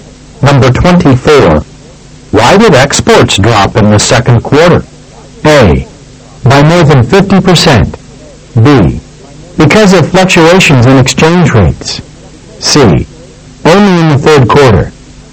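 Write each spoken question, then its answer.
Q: Why did exports drop in the second quarter?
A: B: Because of fluctuations in exchange rates.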